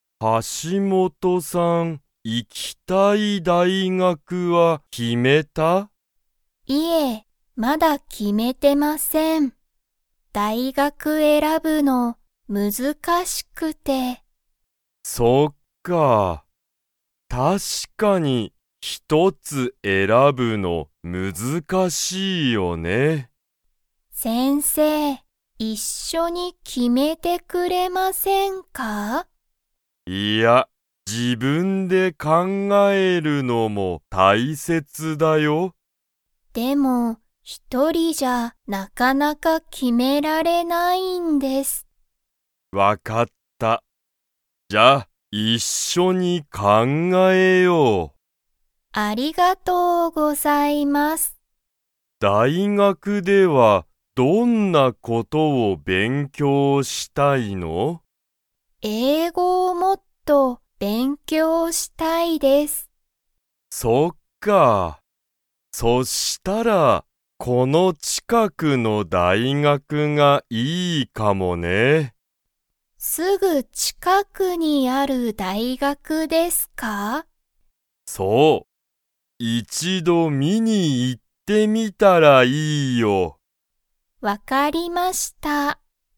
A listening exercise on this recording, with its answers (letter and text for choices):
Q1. 橋本(はしもと)さんは、行(い)きたい大学(だいがく)を決(き)めましたか?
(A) はい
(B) いいえ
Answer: (B) いいえ

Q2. 橋本(はしもと)さんは、____をもっと勉強(べんきょう)したい。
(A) 大学(だいがく)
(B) 先生(せんせい)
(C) 日本語(にほんご)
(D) 英語(えいご)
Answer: (D) 英語(えいご)

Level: Level 2